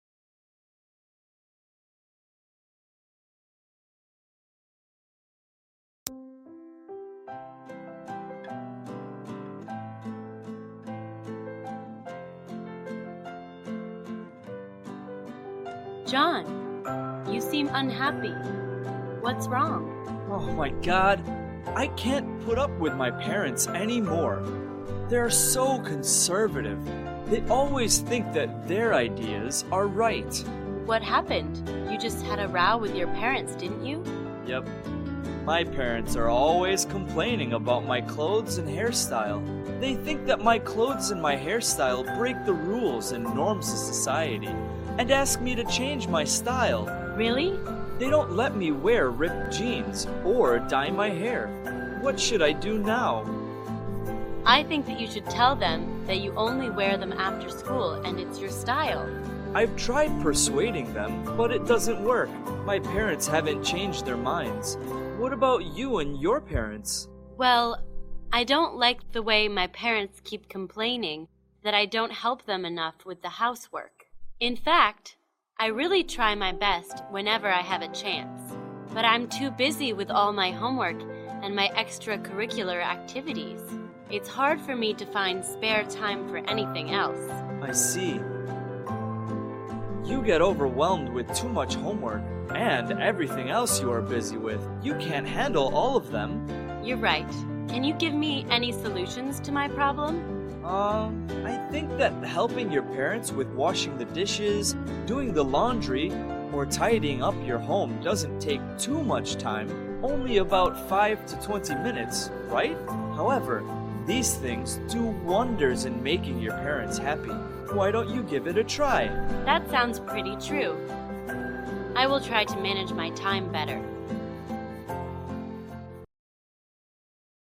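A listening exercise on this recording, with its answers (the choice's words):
Task: Choose the best answer (A, B, or C).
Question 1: Why is John upset with his parents?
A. They don't allow him to go out with friends.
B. They don't like his clothes and hairstyle.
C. They don't support his studies.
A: They don't like his clothes and hairstyle.

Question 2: What does John's friend suggest he should do?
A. Stop wearing ripped jeans completely.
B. Tell his parents he wears them only after school.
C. Ignore his parents' opinion.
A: Tell his parents he wears them only after school.

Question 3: What does John's friend complain about?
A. Not having enough free time.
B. Being scolded for low grades.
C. Doing too much housework.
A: Not having enough free time.

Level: lớp 11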